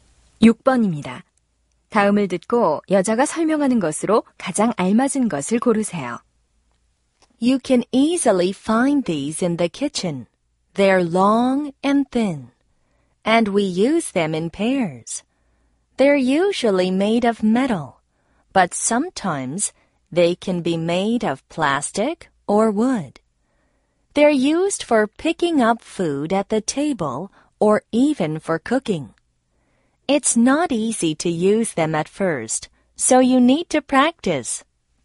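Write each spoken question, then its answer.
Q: 다음을 듣고 여자가 설명하는 것으로 가장 알맞은 것을 고르세요.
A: 젓가락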